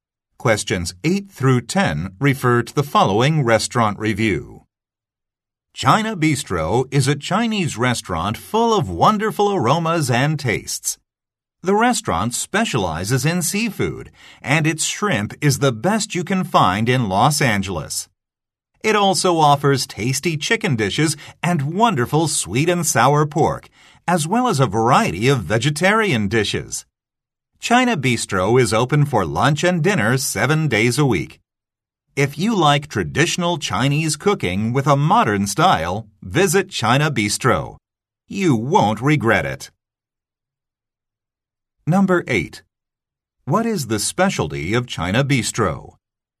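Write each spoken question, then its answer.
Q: What is the specialty of China Bistro?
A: Seafood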